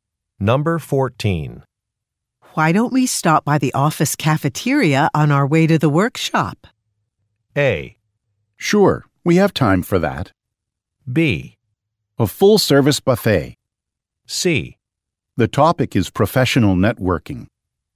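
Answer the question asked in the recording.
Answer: A: Sure, we have time for that.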